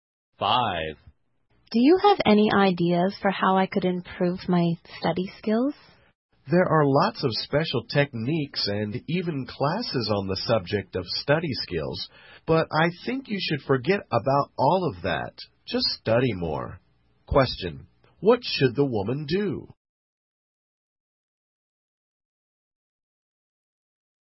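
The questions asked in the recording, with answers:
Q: what should the woman do?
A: Just study more.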